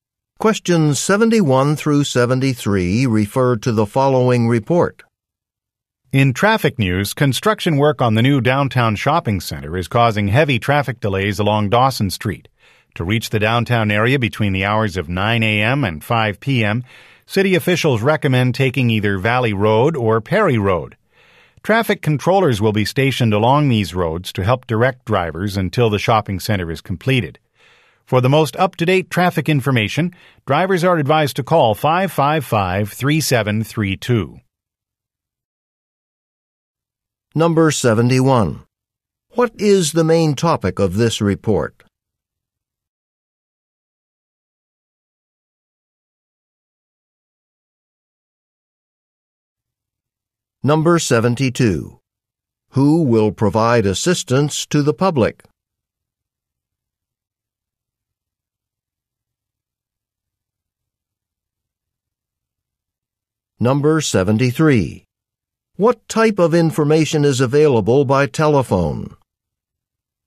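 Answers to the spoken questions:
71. Traffic delays from construction downtown
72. Traffic controllers
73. Up-to-date traffic information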